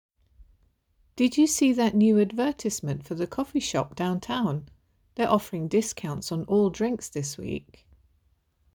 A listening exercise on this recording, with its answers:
Answer the following questions. Write NO MORE THAN TWO WORDS AND/OR A NUMBER for each answer.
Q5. What is the coffee shop offering?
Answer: discounts

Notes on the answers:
They're offering discounts on all drinks this week.